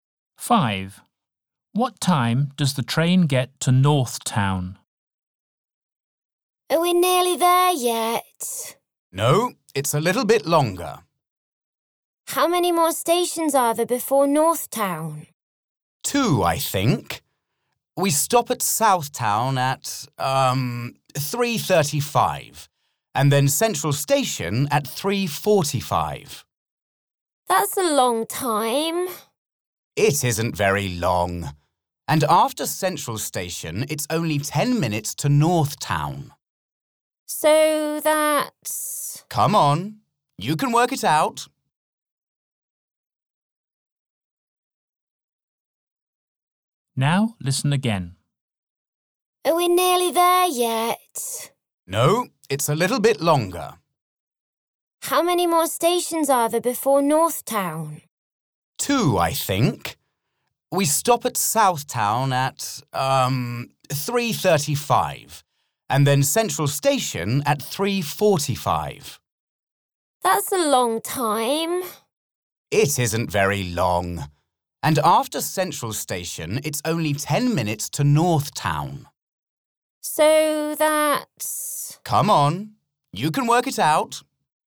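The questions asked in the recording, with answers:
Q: What time does the train get to North Town?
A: 3:55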